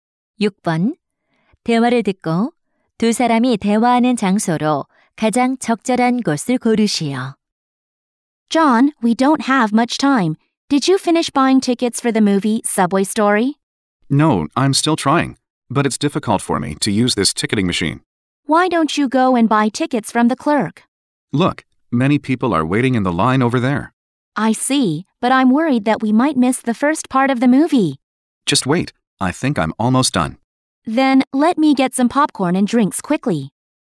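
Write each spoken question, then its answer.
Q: 대화를 듣고 두 사람이 대화하는 장소로 가장 적절한 곳을 고르시오.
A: 영화관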